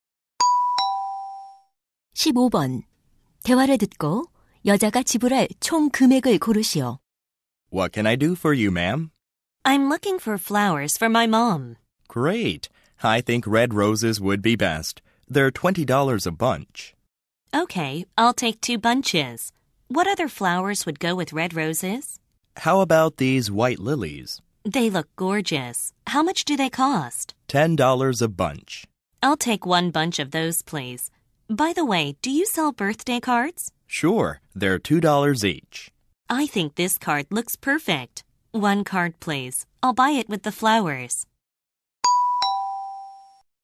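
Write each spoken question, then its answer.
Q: 대화를 듣고 여자가 지불할 총 금액을 고르시오.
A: $52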